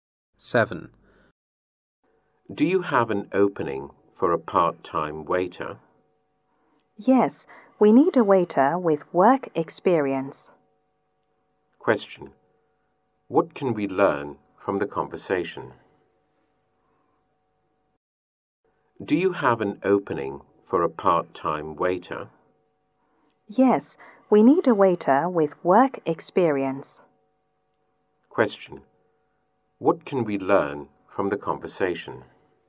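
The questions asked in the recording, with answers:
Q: Question. What can we learn from the conversation?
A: They need a part-time waiter with work experience.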